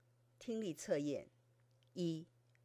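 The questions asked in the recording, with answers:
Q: 我比你高,你比他高,谁最高?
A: 我最高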